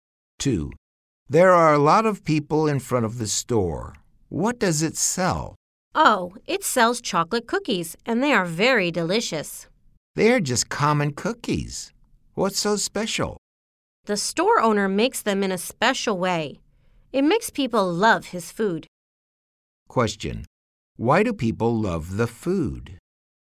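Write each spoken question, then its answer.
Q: Why do people love the food?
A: The store owner makes the cookies in a special way.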